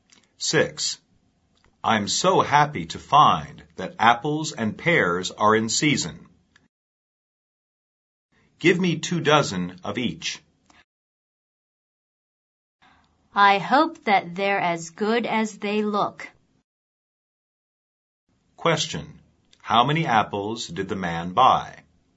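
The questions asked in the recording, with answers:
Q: How many apples did the man buy?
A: 24 (two dozen).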